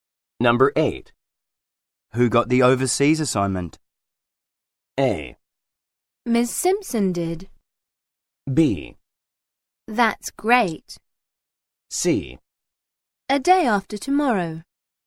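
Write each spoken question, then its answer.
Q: Who got the overseas assignment?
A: A: Miss Simpson did.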